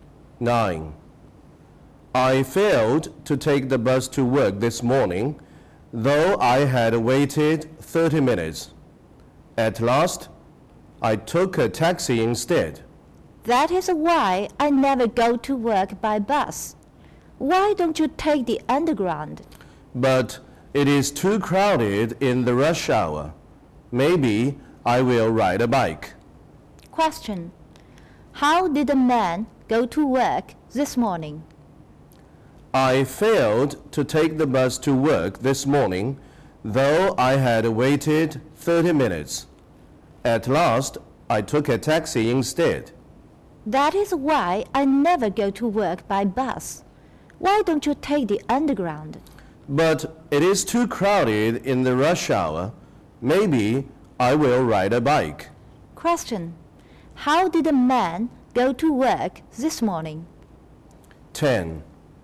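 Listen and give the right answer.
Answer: By taxi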